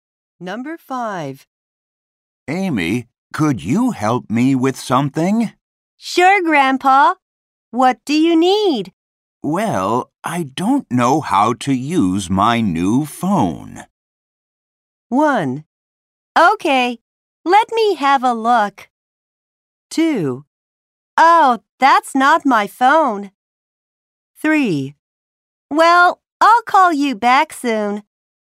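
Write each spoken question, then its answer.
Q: Well, I don't know how to use my new phone.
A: 1: Okay, let me have a look.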